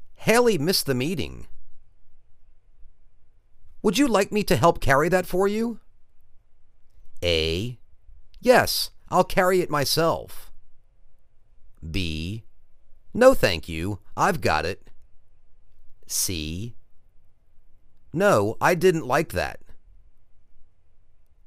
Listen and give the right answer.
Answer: No thank you, I've got it.